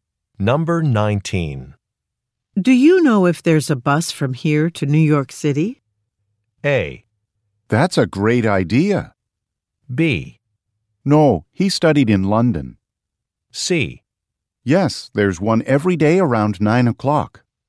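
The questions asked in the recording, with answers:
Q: Do you know if there's a bus from here to New York City?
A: C: Yes, there's one every day around 9 o'clock.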